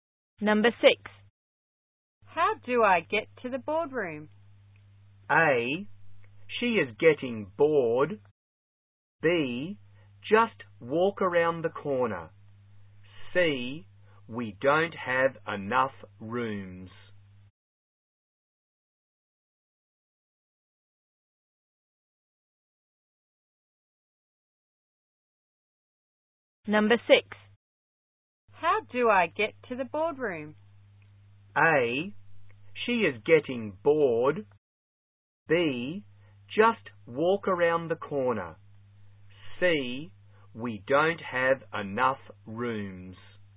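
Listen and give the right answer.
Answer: B: just walk around the corner.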